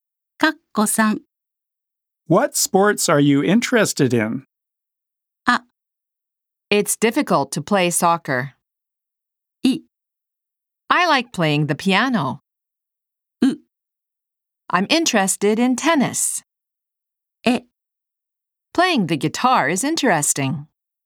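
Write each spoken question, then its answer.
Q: What sports are you interested in?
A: う: I'm interested in tennis.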